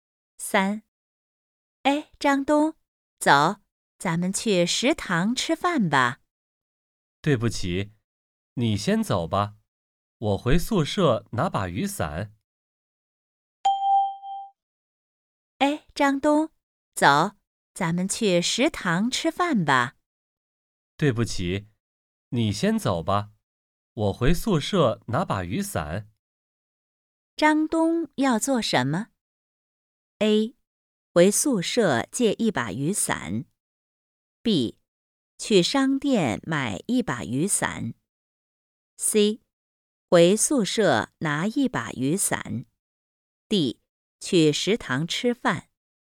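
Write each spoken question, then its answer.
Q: 张东要做什么?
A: C: 回宿舍拿一把雨伞。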